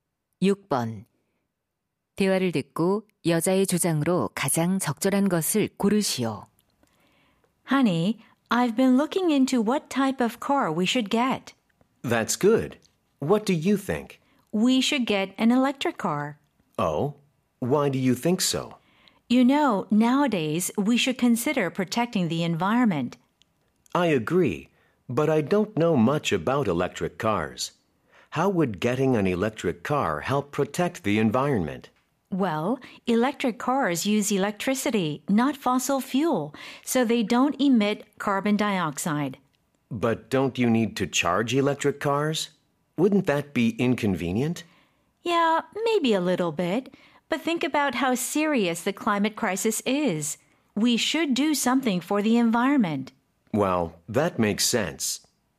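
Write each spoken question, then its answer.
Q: 대화를 듣고 여자의 주장으로 가장 적절한 것을 고르시오.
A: 환경 보호를 위해 전기차를 사야 한다.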